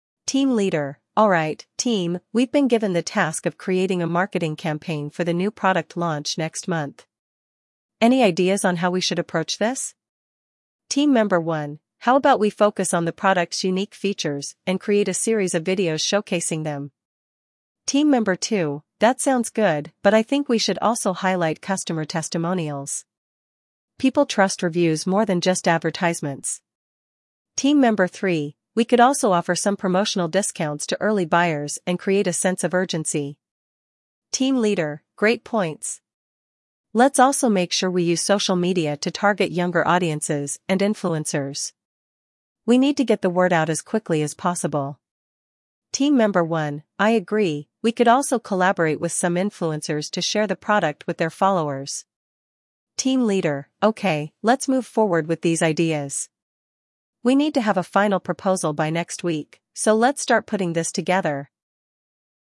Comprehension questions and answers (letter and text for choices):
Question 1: What is the task given to the team?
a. To organize an event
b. To create a marketing campaign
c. To create a new product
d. To write a report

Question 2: What does Team Member 1 suggest for the marketing campaign?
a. Hosting a giveaway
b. Creating a series of videos showcasing the product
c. Focusing on print advertisements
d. Creating a podcast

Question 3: What does Team Member 2 think should also be included?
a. Testimonials from customers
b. Information about competitors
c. Promotional coupons for stores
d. Detailed product descriptions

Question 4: What idea does Team Member 3 propose?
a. Offering promotional discounts to early buyers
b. Hosting a product launch event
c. Creating print brochures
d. Sponsoring a TV show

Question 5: How does the team leader suggest reaching younger audiences?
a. Through email marketing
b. By using social media and influencers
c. By advertising in newspapers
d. By using billboards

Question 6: What is the deadline for the final proposal?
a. This week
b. Next month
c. By next week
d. In two weeks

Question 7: Which of these is NOT mentioned as part of the marketing campaign ideas?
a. Discount offers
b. Videos showcasing product features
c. Social media promotions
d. Customer satisfaction surveys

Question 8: What is the team's next step after discussing the ideas?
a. To start the product design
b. To create a proposal based on these ideas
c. To choose the best video platform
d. To plan the launch event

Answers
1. b. To create a marketing campaign
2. b. Creating a series of videos showcasing the product
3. a. Testimonials from customers
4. a. Offering promotional discounts to early buyers
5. b. By using social media and influencers
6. c. By next week
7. d. Customer satisfaction surveys
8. b. To create a proposal based on these ideas

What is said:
Team Leader: "Alright, team, we've been given the task of creating a marketing campaign for the new product launch next month. Any ideas on how we should approach this?"
Team Member 1: "How about we focus on the product's unique features and create a series of videos showcasing them?"
Team Member 2: "That sounds good, but I think we should also highlight customer testimonials. People trust reviews more than just advertisements."
Team Member 3: "We could also offer some promotional discounts to early buyers and create a sense of urgency."
Team Leader: "Great points! Let's also make sure we use social media to target younger audiences and influencers. We need to get the word out as quickly as possible."
Team Member 1: "I agree, we could also collaborate with some influencers to share the product with their followers."
Team Leader: "Okay, let's move forward with these ideas. We need to have a final proposal by next week, so let's start putting this together!"